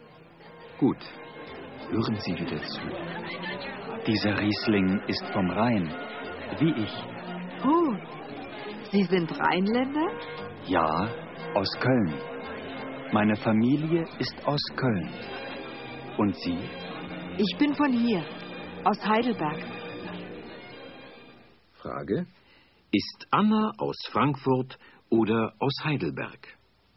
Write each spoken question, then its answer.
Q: Frage: Ist Anna aus Frankfurt oder aus Heidelberg?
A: Sie ist aus Heidelberg.